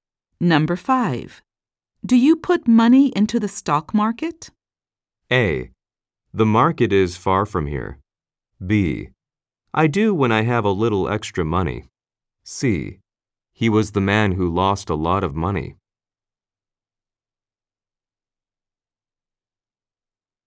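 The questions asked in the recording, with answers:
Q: Do you put money into the stock market?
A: B: I do when I have a little extra money.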